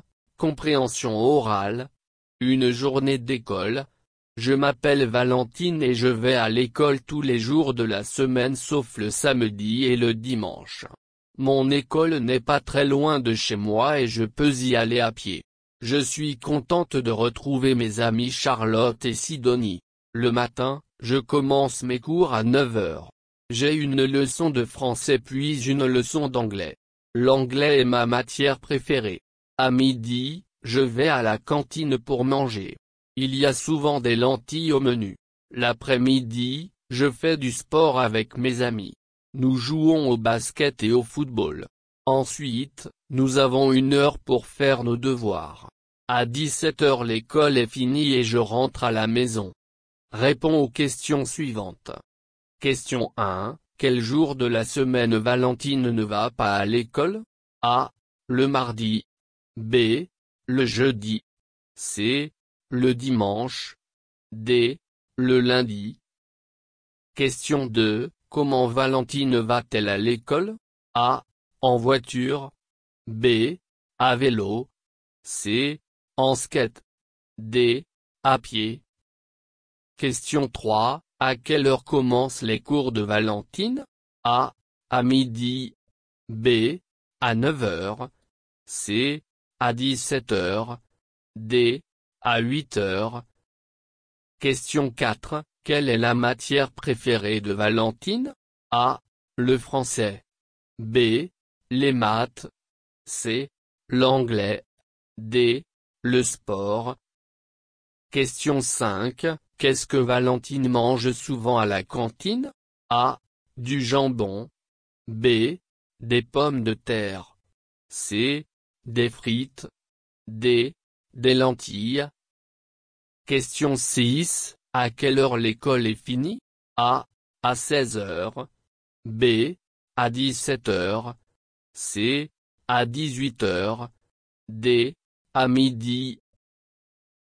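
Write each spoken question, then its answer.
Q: Quel jour de la semaine Valentine ne va pas à l'école?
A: C: Le dimanche

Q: Comment Valentine va-t-elle à l'école?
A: D: À pied

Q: À quelle heure commencent les cours de Valentine?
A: B: À 9h

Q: Quelle est la matière préférée de Valentine?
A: C: L'anglais

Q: Qu'est-ce que Valentine mange souvent à la cantine?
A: D: Des lentilles

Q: À quelle heure l'école est finie?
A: B: À 17h

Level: Basis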